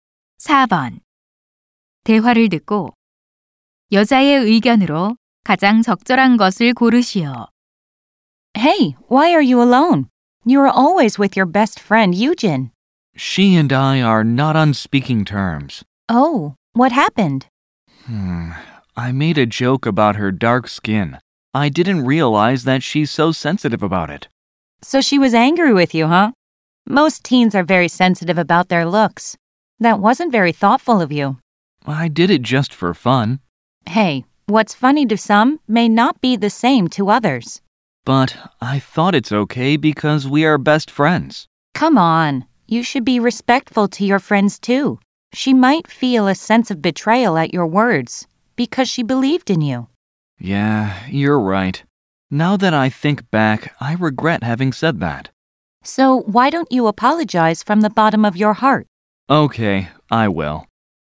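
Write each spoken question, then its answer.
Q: 대화를 듣고 여자의 의견으로 가장 적절한 것을 고르시오.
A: 친구에게도 존중하는 태도를 보여야 한다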